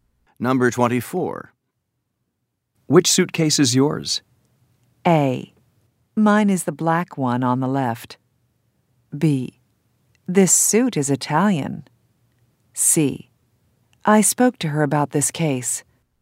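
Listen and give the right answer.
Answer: A: Mine is the black one on the left.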